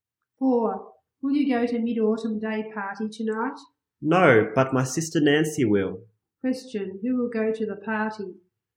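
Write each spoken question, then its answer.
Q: who will go to the party?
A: Nancy, his sister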